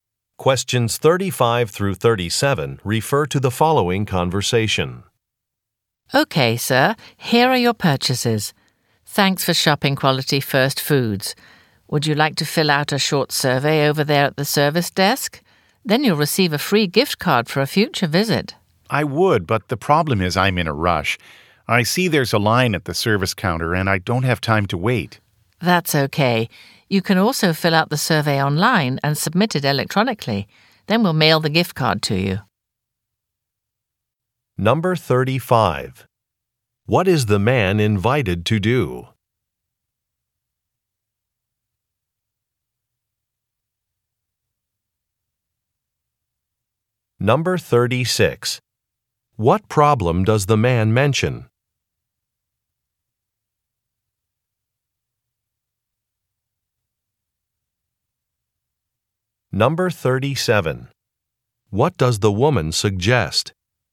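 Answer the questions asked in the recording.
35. Fill out a short survey
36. He is in a rush and can't wait in line
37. Filling out the survey online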